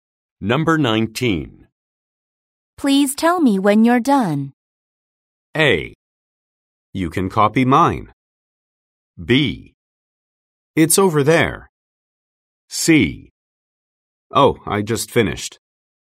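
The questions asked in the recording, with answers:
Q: Please tell me when you're done.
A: C: Oh, I just finished.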